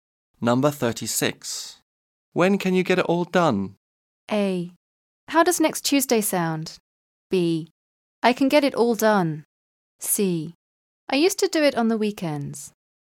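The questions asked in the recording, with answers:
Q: When can you get it all done?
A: A: How does next Tuesday sound?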